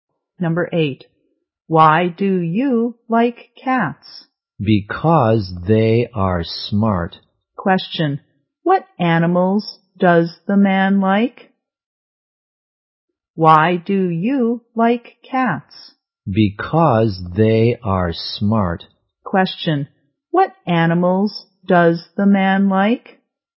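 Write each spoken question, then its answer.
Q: what animals does the man like?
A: Cats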